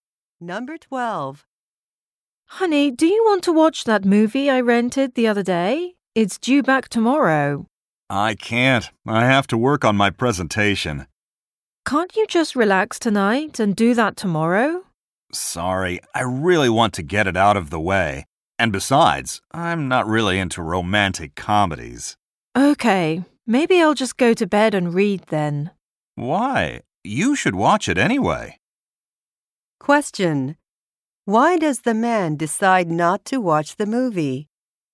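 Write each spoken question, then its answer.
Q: Why does the man decide not to watch the movie?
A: He wants to get his presentation done, and he doesn't like romantic comedies.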